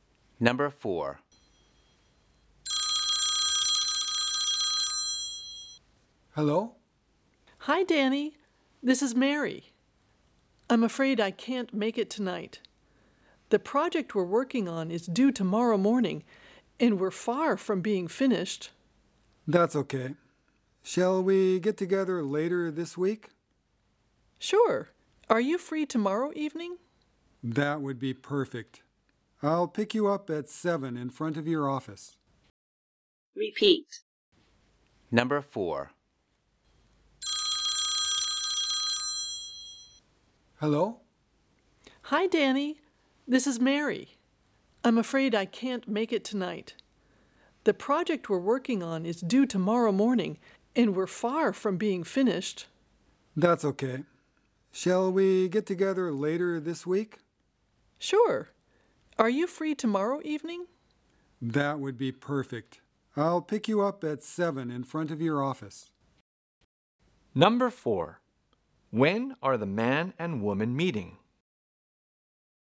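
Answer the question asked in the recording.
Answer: Tomorrow evening at 7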